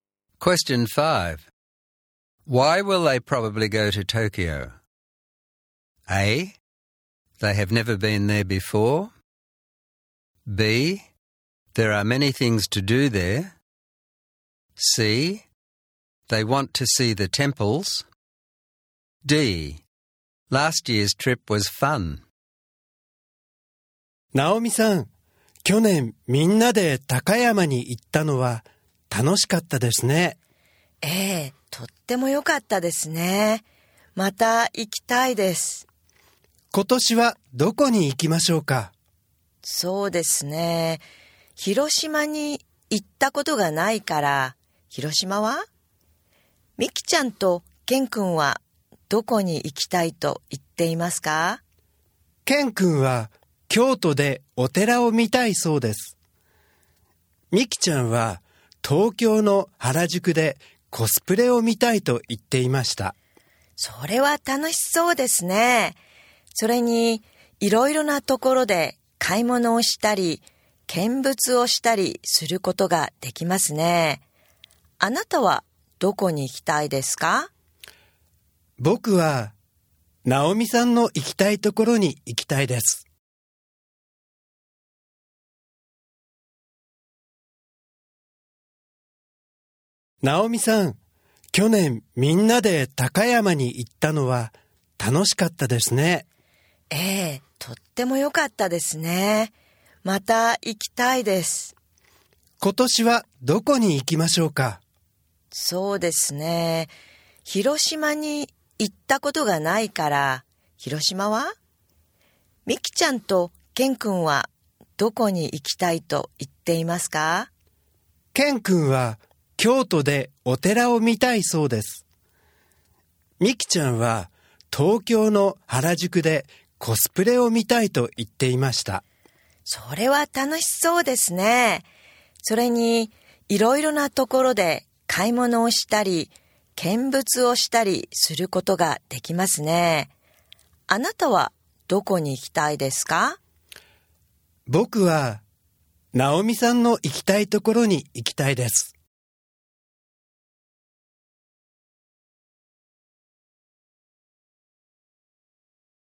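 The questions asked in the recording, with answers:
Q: Why will they probably go to Tokyo?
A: B: There are many things to do there.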